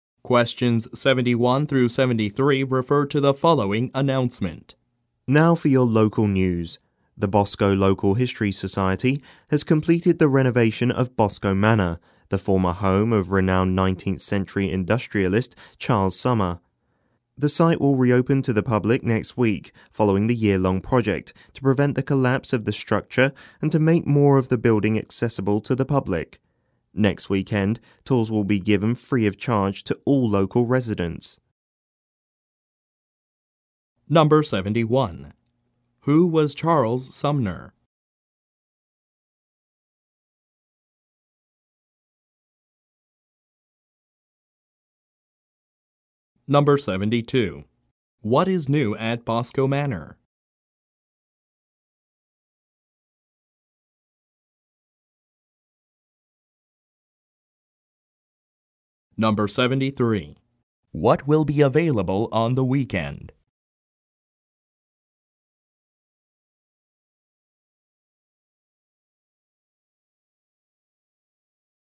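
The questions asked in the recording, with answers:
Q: Who was Charles Sumner?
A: A renowned 19th century industrialist

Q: What will be available on the weekend?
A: Free tours for local residents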